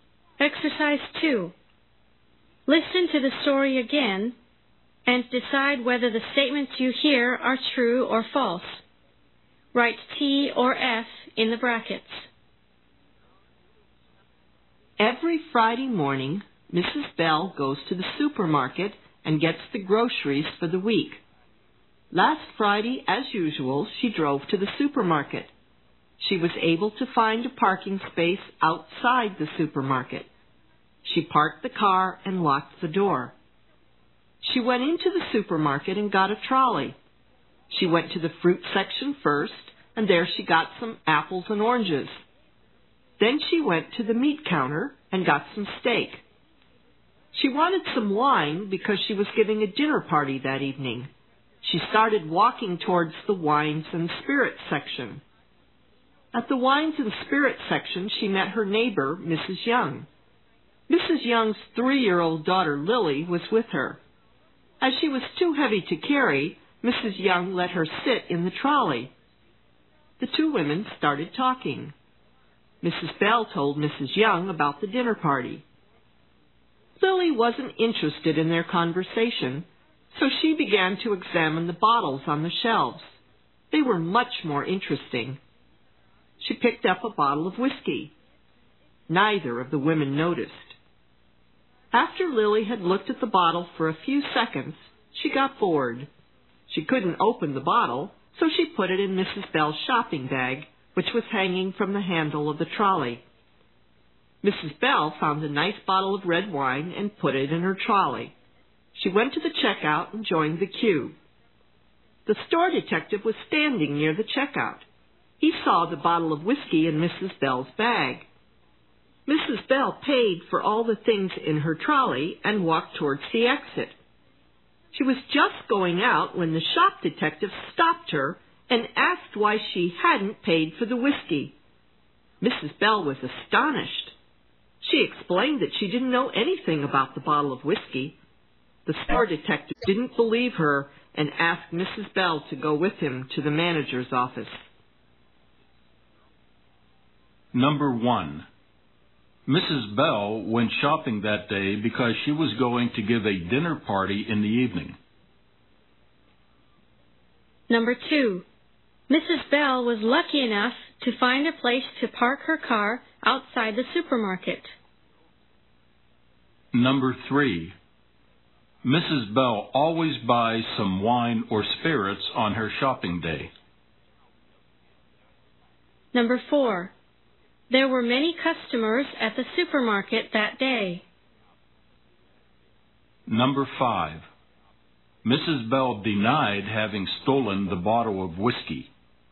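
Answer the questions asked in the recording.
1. False
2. True
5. True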